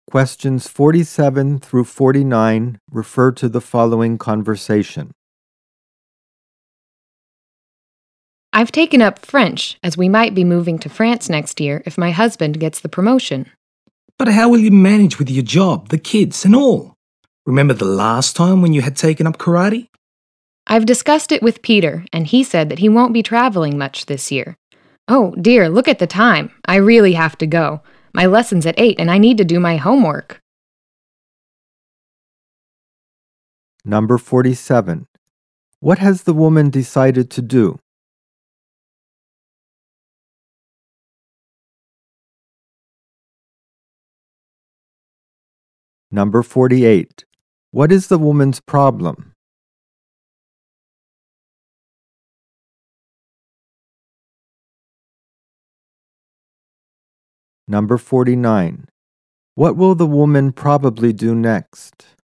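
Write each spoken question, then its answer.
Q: What has the woman decided to do?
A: Learn French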